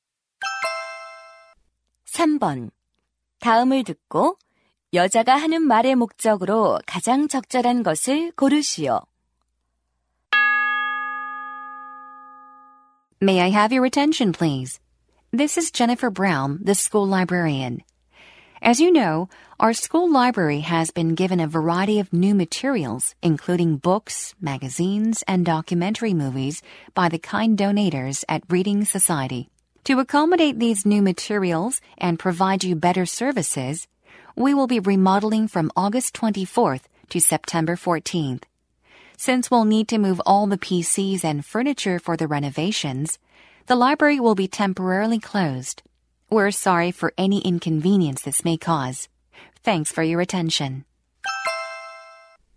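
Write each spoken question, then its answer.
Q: 다음을 듣고 여자가 하는 말의 목적으로 가장 적절한 것을 고르시오.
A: 리모델링으로 인한 도서관 임시 휴관 안내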